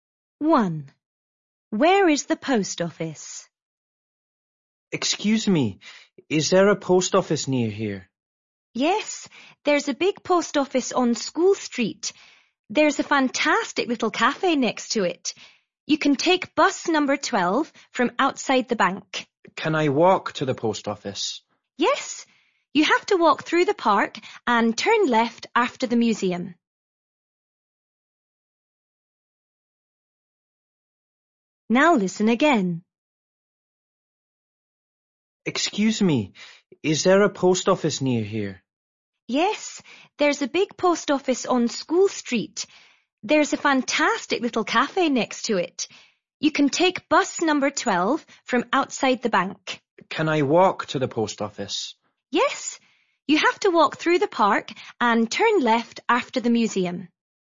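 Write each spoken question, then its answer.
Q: Where is the post office?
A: On School Street, next to a cafe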